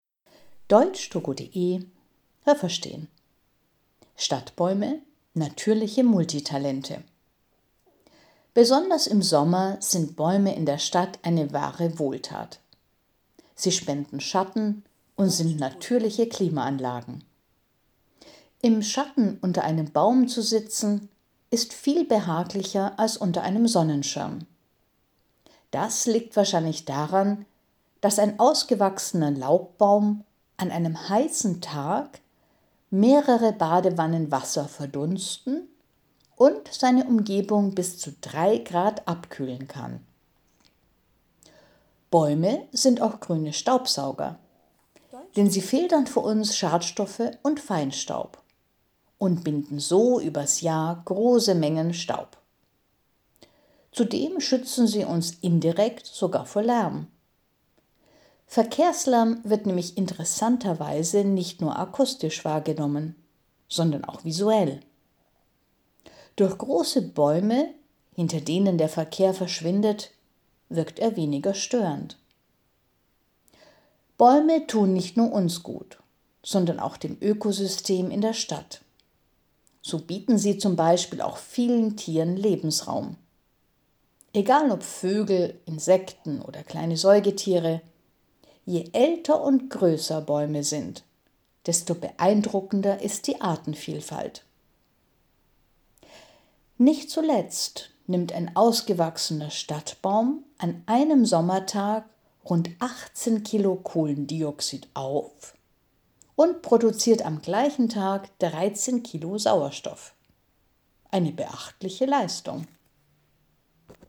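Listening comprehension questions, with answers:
Haben Sie das gehört? Stimmt diese Aussage?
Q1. Bäume spenden einen angenehmeren Schatten als Sonnenschirme.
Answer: Ja, das habe ich gehört.

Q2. Schon ein kleiner junger Laubbaum kann im Sommer die Umgebung bis zu 3 Grad abkühlen.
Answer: Nein, das habe ich nicht gehört.

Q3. Bäume können wie Filter wirken und Luftschadstoffe und Staub einfangen.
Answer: Ja, das habe ich gehört.

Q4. Da man Verkehrslärm auch mit den Augen wahrnimmt, verschwindet ein Teil des Lärms hinter großen Bäumen.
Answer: Ja, das habe ich gehört.

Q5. Bäume sind eine Wohltat für den Menschen und auch für das städtische Ökosystem.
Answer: Ja, das habe ich gehört.

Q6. Junge und kleine Bäume sind besonders reich an unterschiedlichen Lebensformen.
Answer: Nein, das habe ich nicht gehört.

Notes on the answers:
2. Ein kleiner Laubbaum kann das nicht, aber ein ausgewachsener.
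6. Es gilt die Regel: Je älter und größer ein Baum, desto größer auch die Artenvielfalt.

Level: C1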